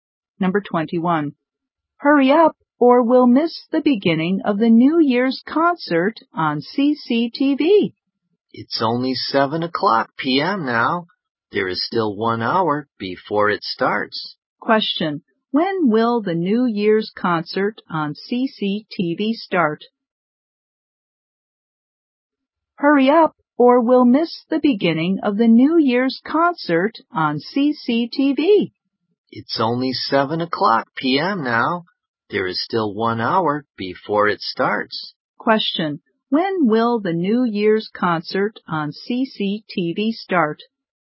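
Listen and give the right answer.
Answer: At 8 p.m.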